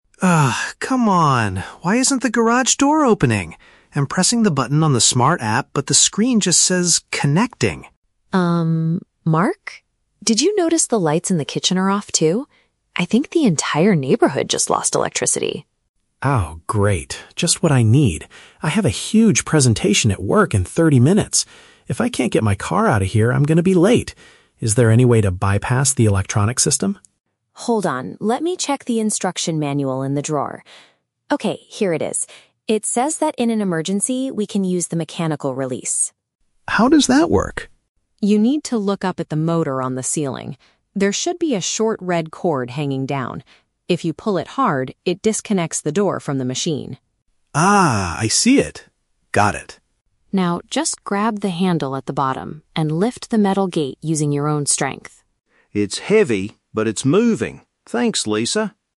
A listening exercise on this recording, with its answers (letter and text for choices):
Listen to a conversation between a husband and wife. For each question, choose the correct answer (A, B, or C).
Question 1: Why is Mark unable to open the garage door at the beginning?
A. The smartphone application is completely broken.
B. There is a temporary loss of power in their area.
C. The metal gate is frozen shut due to cold weather.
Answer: B. There is a temporary loss of power in their area.

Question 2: How does Mark feel about the situation?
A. Stressed because he might miss an important professional event.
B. Angry at his wife for forgetting to charge the smart device.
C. Relieved because he now has an excuse to stay home from work.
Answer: A. Stressed because he might miss an important professional event.

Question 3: According to Lisa, what is the final step to open the garage?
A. Pull down a bright red rope hanging from the ceiling.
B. Use a special physical key to unlock the bottom handle.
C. Manually push the heavy door upwards by himself.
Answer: C. Manually push the heavy door upwards by himself.

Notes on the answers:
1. Lisa notices the kitchen lights are off and says, "the entire neighborhood just lost electricity." Option (B) correctly paraphrases this situation ("loss of power" for "lost electricity", "area" for "neighborhood"). Option (A) is a trap; Mark says the app says "connecting," but the root cause is the power outage, not a broken app. Option (C) is a plausible real-world problem but is never mentioned.
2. Mark complains, "I have a huge presentation at work in thirty minutes! ... I'm going to be late." Option (A) uses synonyms ("professional event" for "presentation at work", "might miss" for "going to be late"). Option (B) is a trap; he is upset, but not at his wife. Option (C) is the exact opposite of how he feels.
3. Lisa's final instruction is to "grab the handle at the bottom and lift the metal gate using your own strength." Option (C) paraphrases this action ("Manually push... upwards" for "lift", "by himself" for "using your own strength"). Option (A) is a trap; pulling the cord is the first step she mentions to disconnect the motor, not the f

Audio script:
Mark: Ugh, come on! Why isn't the garage door opening? I'm pressing the button on the smart app, but the screen just says "connecting."
Did you notice the lights in the kitchen are off, too? I think the entire neighborhood just lost electricity.
Mark: Oh, great. Just what I need. I have a huge presentation at work in thirty minutes! If I can't get my car out of here, I'm going to be late. Is there any way to bypass the electronic system?
Lisa: Hold on, let me check the instruction manual in the drawer. Okay, here it is. It says that in an emergency, we can use the mechanical release.
Mark: How does that work?
Lisa: You need to look up at the motor on the ceiling. There should be a short red cord hanging down. If you pull it hard, it disconnects the door from the machine.
Mark: Ah, I see it! Got it.
Lisa: Now, just grab the handle at the bottom and lift the metal gate using your own strength.